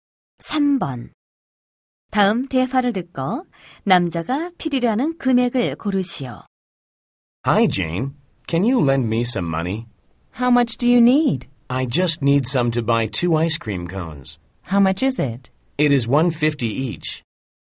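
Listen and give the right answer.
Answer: 300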